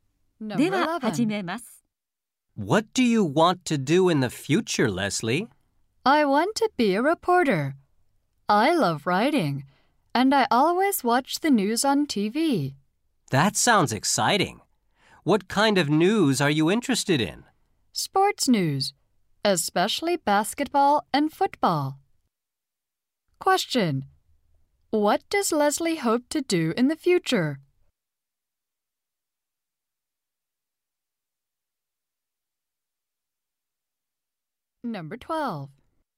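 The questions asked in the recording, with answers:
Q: What does Leslie hope to do in the future?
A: Become a reporter.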